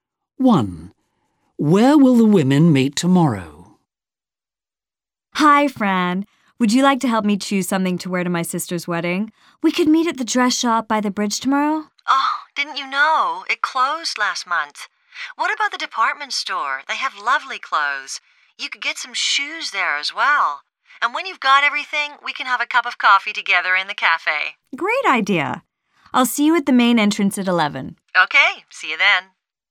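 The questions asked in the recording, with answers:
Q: Where will the women meet tomorrow?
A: At the main entrance of the department store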